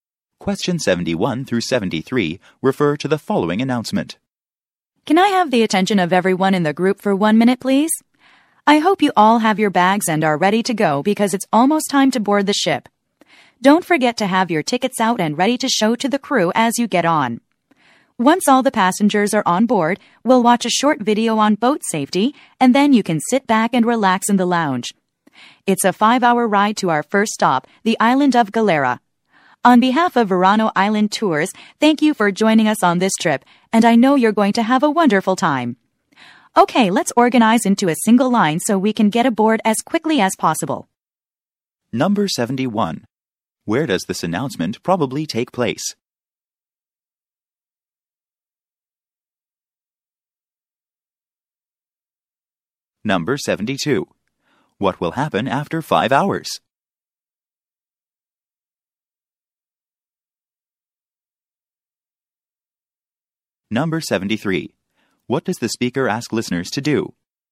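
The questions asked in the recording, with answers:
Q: Where does this announcement probably take place?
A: At a boat dock / port, before boarding a ship

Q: What will happen after 5 hours?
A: They will arrive at the island of Galera, the first stop

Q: What does the speaker ask listeners to do?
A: Form a single line and have their tickets ready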